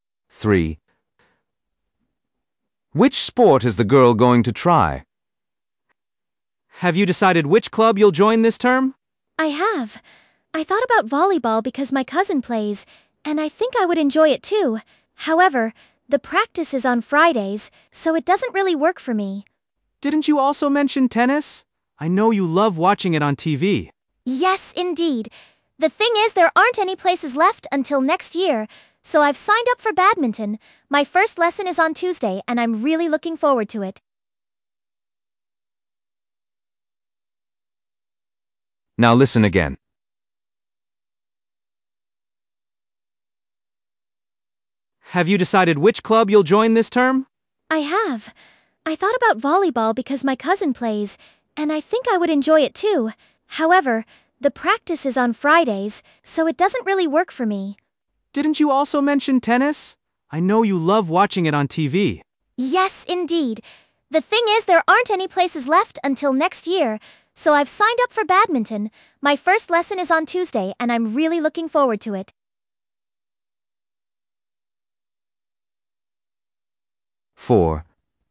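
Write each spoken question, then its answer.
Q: Which sport is the girl going to try?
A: badminton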